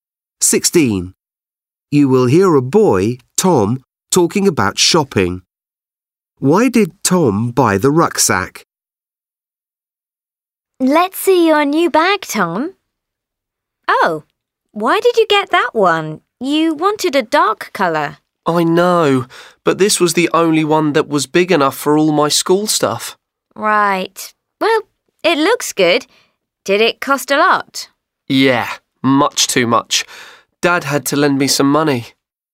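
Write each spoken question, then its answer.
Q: Why did Tom buy the rucksack?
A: It was the only one big enough for all his school stuff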